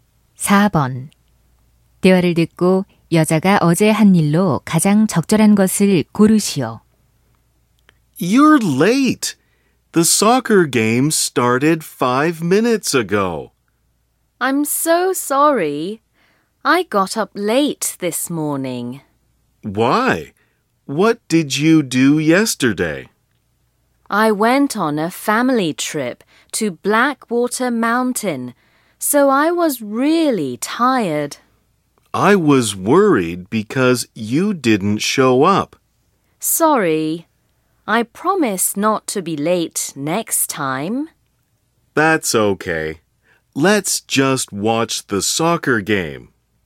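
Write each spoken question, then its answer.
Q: 대화를 듣고 여자가 어제 한 일로 가장 적절한 것을 고르시오.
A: Blackwater 산으로 가족 여행을 감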